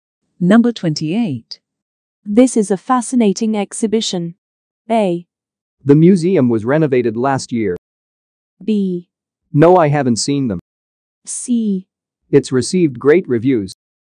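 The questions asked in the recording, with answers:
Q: This is a fascinating exhibition.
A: C: It's received great reviews.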